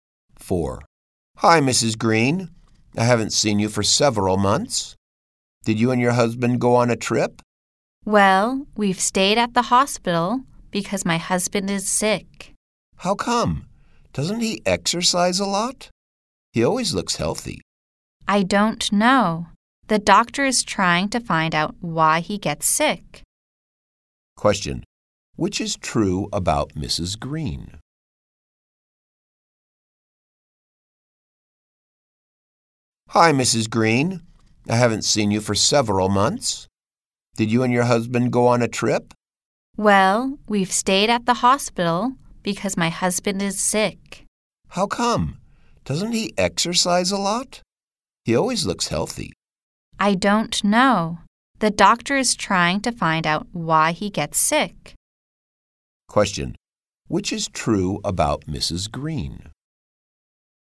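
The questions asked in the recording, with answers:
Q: Question. Which is true about Mrs.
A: She has been staying at the hospital because her husband is sick.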